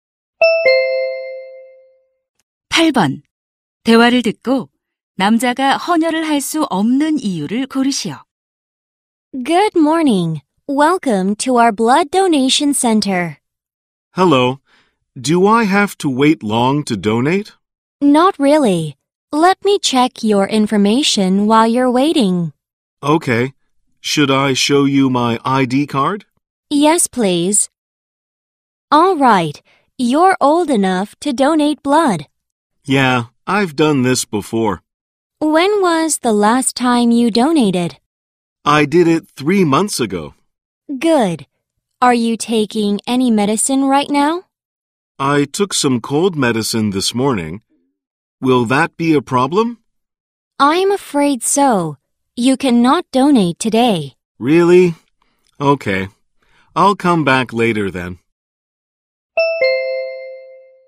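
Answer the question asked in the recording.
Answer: 오늘 아침 감기약을 먹어서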